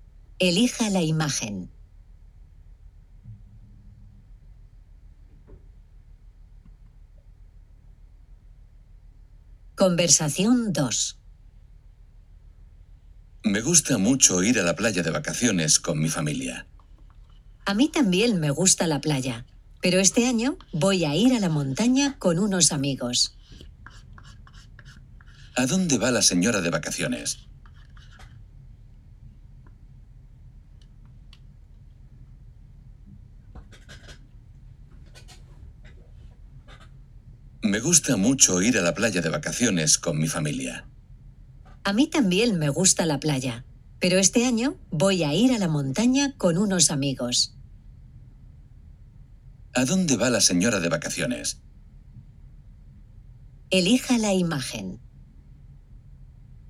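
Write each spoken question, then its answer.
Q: ¿A dónde va la señora de vacaciones?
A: A la montaña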